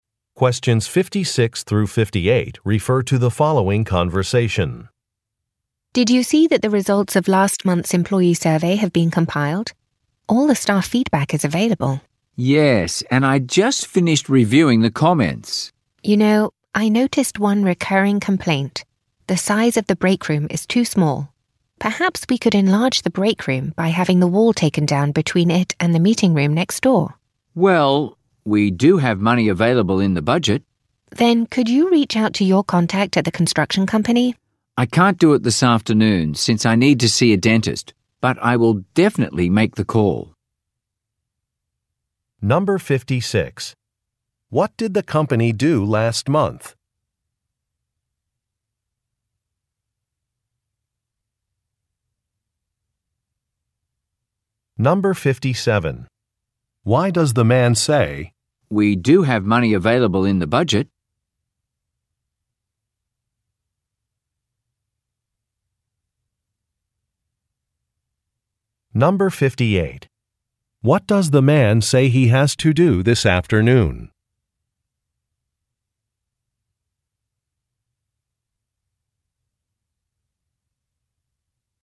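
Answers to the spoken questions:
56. It conducted an employee survey
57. To indicate that enlarging the break room is affordable
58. See a dentist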